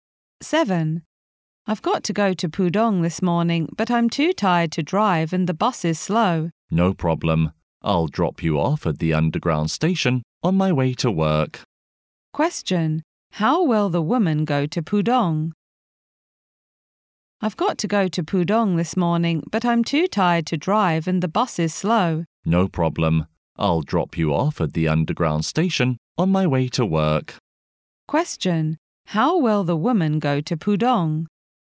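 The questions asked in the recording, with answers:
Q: How will the woman go to Pudong?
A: By underground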